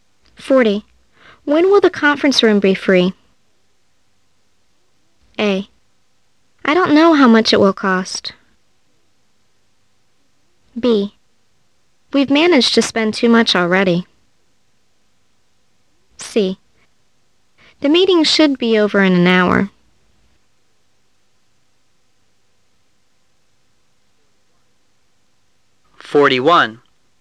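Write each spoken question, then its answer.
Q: When will the conference room be free?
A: C: The meeting should be over in an hour.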